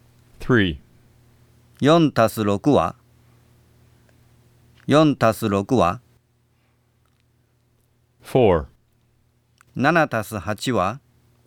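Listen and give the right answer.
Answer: 10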